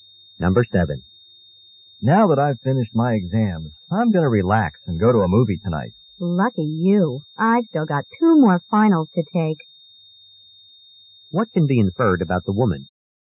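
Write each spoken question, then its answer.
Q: What can be inferred about the woman?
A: She hasn't finished her exams yet.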